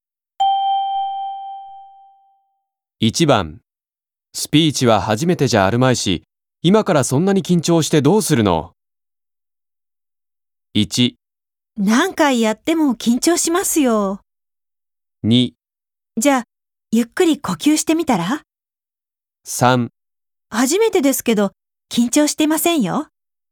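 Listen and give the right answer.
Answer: 1: 何回やっても緊張しますよ。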